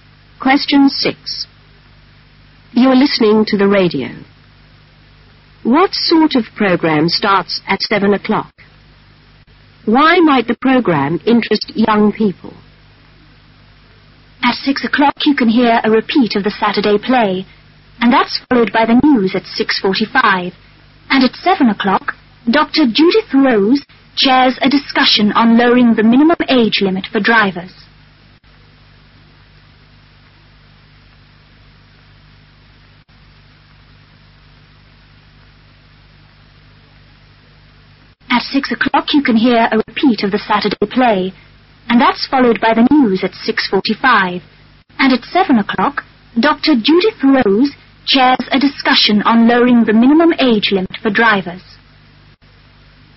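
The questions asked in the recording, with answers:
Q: What sort of program starts at 7 o'clock?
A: A discussion

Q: Why might the program interest young people?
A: It is about lowering the minimum age limit for drivers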